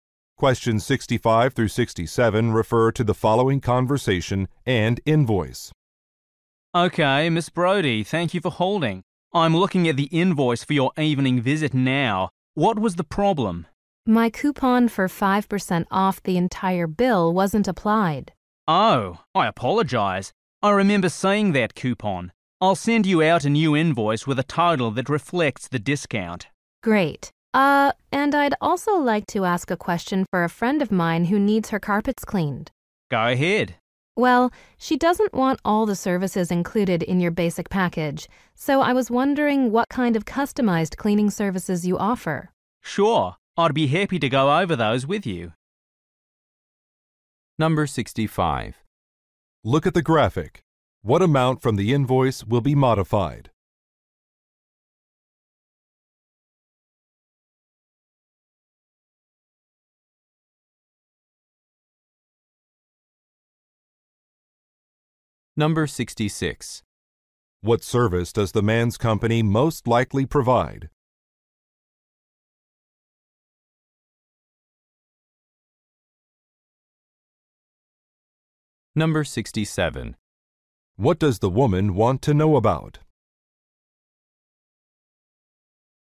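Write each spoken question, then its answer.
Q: What does the woman want to know about?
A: Customized cleaning services.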